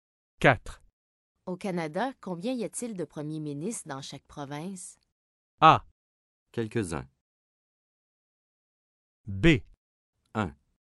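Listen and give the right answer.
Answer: B: 1.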